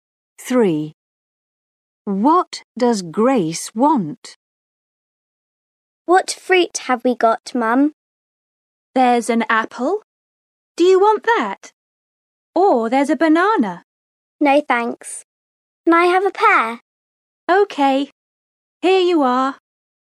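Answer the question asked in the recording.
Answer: A pear.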